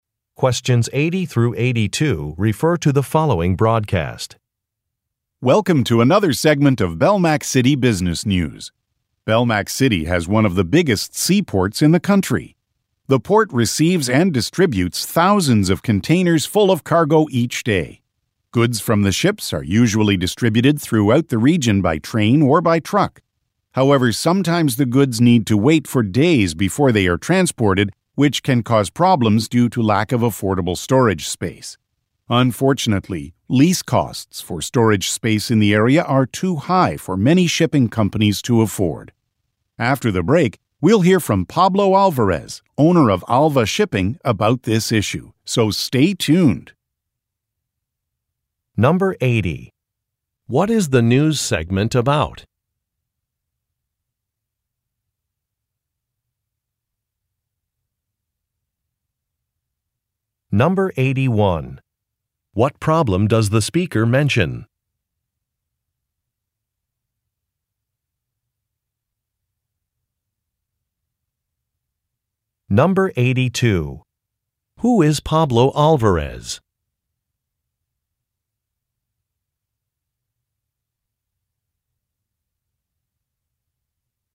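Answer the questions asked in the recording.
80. A local seaport and shipping goods
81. Storage space is too expensive
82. The owner of a shipping company (Alva Shipping)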